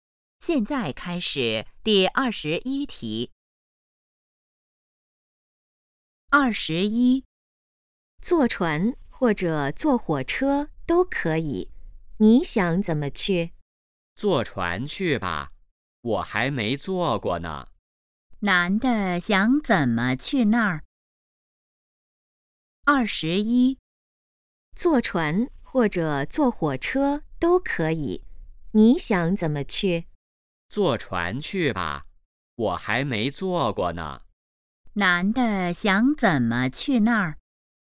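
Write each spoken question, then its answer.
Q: 男的想怎么去那儿?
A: 坐船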